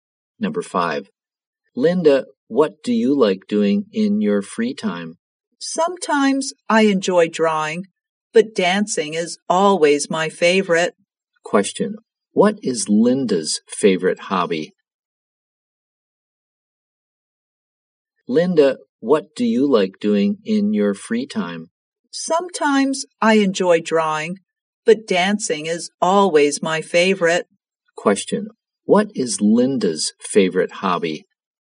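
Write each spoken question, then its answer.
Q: What is Linda's favorite hobby?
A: Dancing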